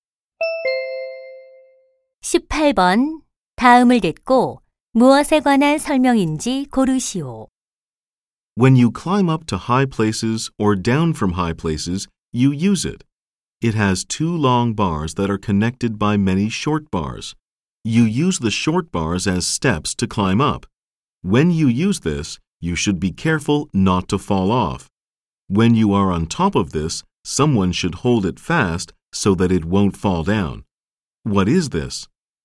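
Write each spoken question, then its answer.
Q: 다음을 듣고 무엇에 관한 설명인지 고르시오.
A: 사다리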